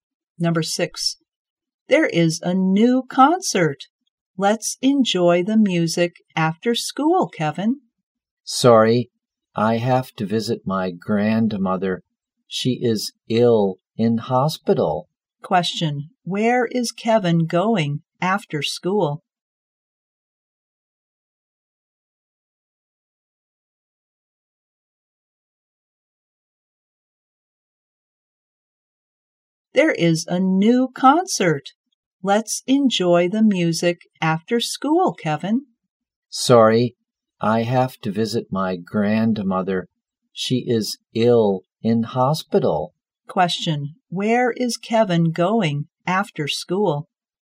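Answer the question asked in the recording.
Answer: To the hospital.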